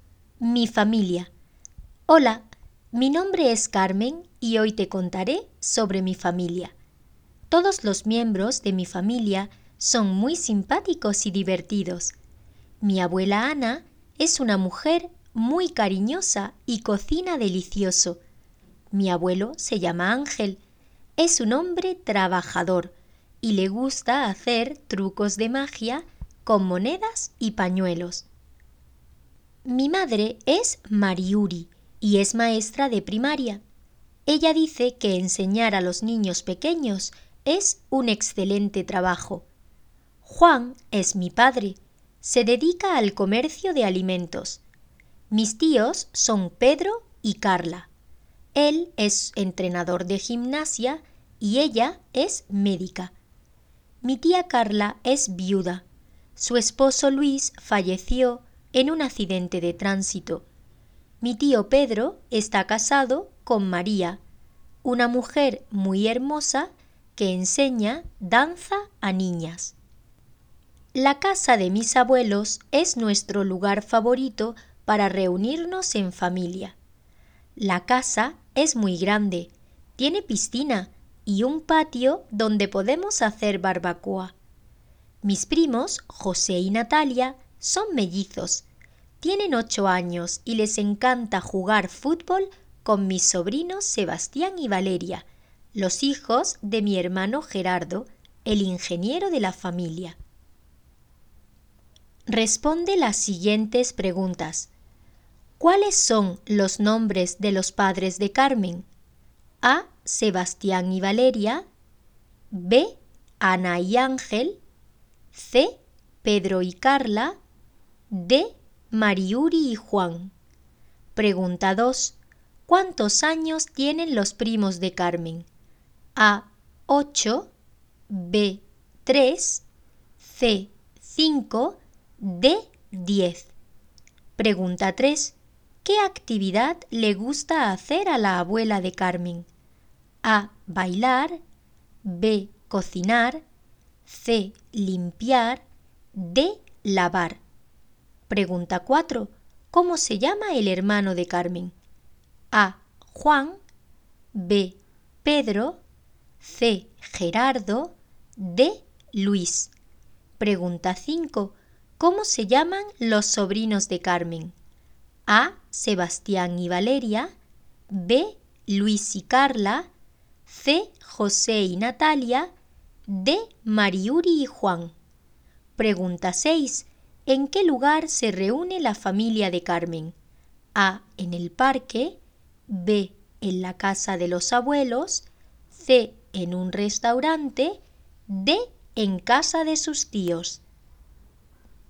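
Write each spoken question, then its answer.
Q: ¿Cuáles son los nombres de los padres de Carmen?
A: D: Mariuri y Juan

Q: ¿Cuántos años tienen los primos de Carmen?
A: A: 8

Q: ¿Qué actividad le gusta hacer a la abuela de Carmen?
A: B: Cocinar

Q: ¿Cómo se llama el hermano de Carmen?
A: C: Gerardo

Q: ¿Cómo se llaman los sobrinos de Carmen?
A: A: Sebastián y Valeria

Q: ¿En qué lugar se reúne la familia de Carmen?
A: B: En la casa de los abuelos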